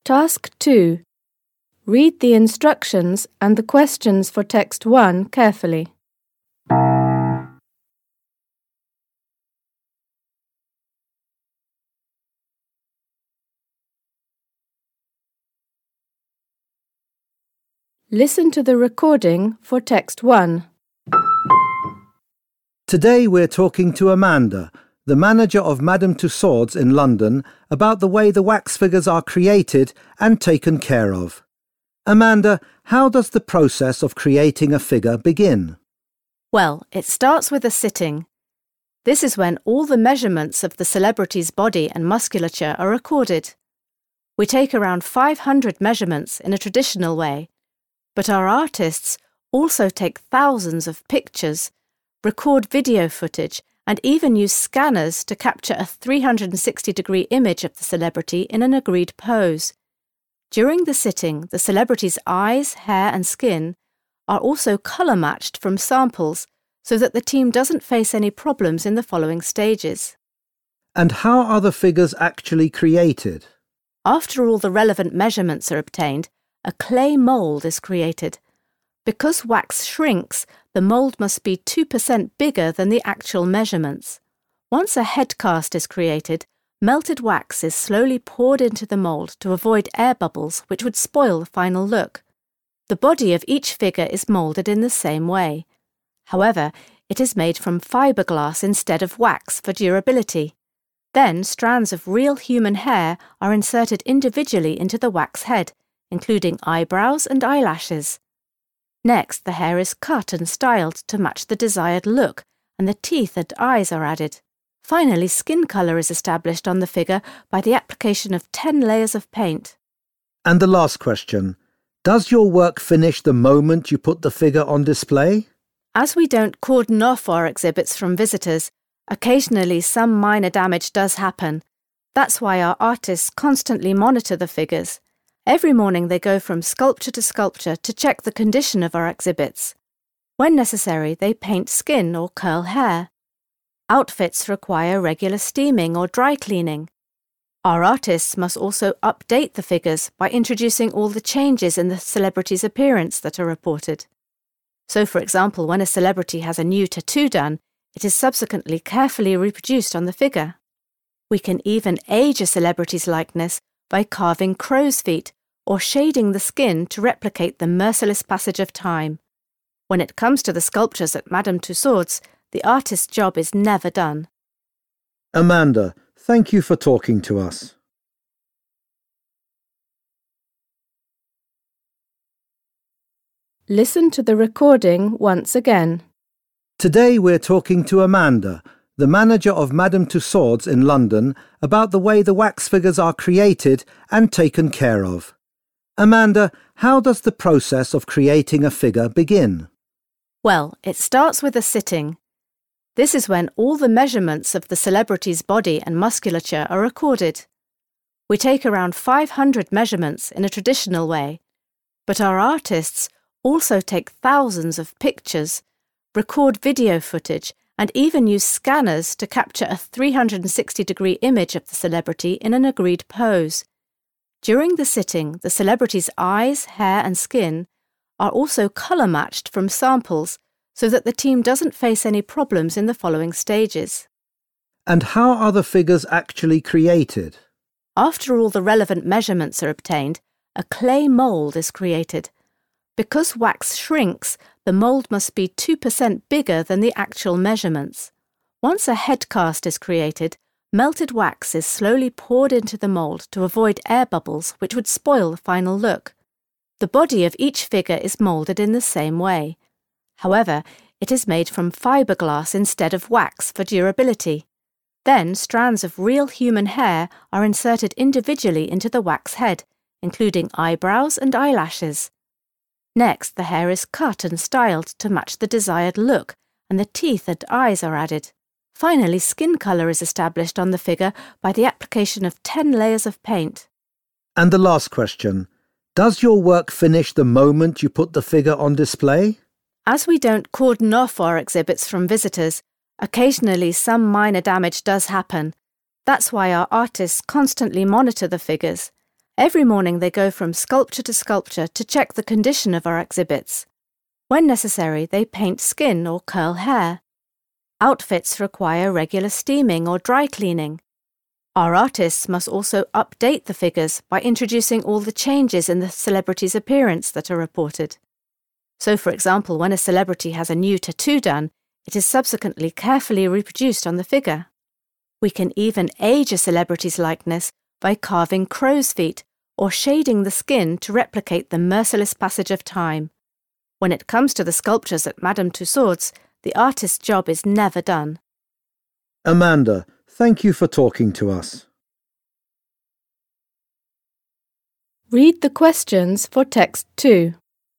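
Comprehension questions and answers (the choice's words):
For questions 2.1.–2.6., choose the answer which best matches what you have heard by circling the appropriate letter (A, B, C or D). Questions 2.1.–2.3. are for Text 1, questions 2.4.–2.6. are for Text 2. You will hear the recording twice.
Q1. While elaborating on the measurement stage, Amanda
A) explains how the model's final pose is agreed upon.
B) highlights the importance of having a number of sittings.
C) justifies the decision to refrain from using the latest technologies.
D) draws attention to the use of multiple methods to collect the required data.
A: draws attention to the use of multiple methods to collect the required data.

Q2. Which is TRUE about the process of creating the figure?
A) The clay moulds exactly match the measurements taken from the celebrity.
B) Imperfections may occur if a certain procedure is carried out too rapidly.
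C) Custom-made wigs with natural hair are prepared for the figures.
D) Wax is used to create both the head and body of the figure.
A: Imperfections may occur if a certain procedure is carried out too rapidly.

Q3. When answering the last question, Amanda focuses on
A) the continuous need to adjust and maintain the figures.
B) efforts made to mitigate the signs of ageing on the figures.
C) the measures taken to protect the figures from getting damaged.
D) updating the outfits worn by the figures in line with contemporary trends.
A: the continuous need to adjust and maintain the figures.

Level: Poziom: dwujęzyczny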